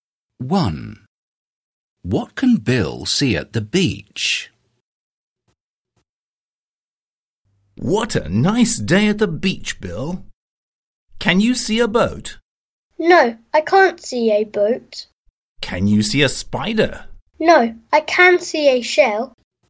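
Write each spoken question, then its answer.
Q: What can Bill see at the beach?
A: a shell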